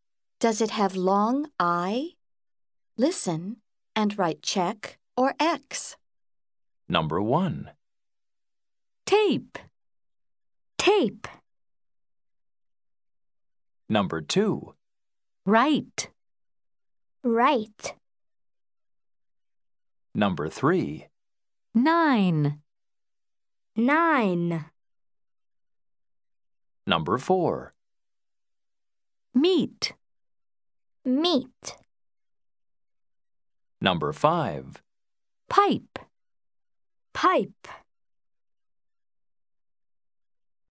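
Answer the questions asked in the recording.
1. No (X): tape
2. Yes (check): write
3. Yes (check): nine
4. No (X): meet
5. Yes (check): pipe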